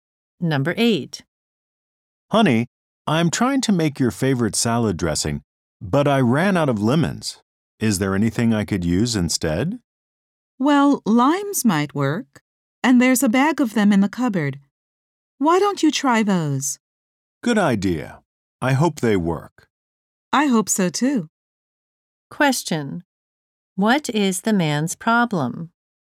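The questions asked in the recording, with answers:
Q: What is the man's problem?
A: He has run out of lemons for the salad dressing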